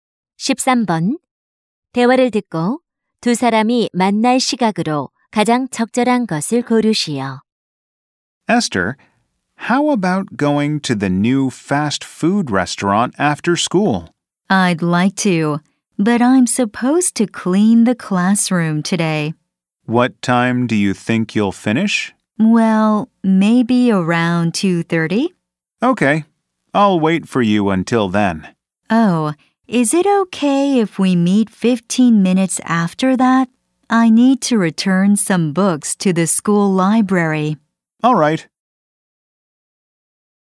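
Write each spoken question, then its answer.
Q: 대화를 듣고 두 사람이 만날 시각으로 가장 적절한 것을 고르시오.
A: 2시 45분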